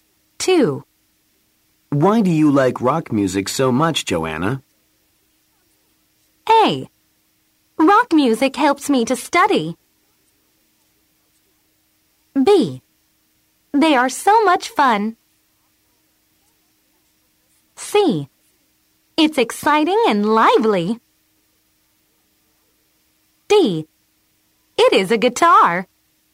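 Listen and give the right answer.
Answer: C: It's exciting and lively.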